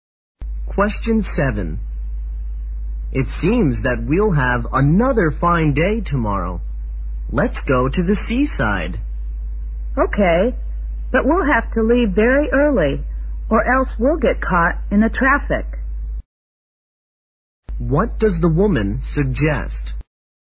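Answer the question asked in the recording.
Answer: Leaving very early to avoid the traffic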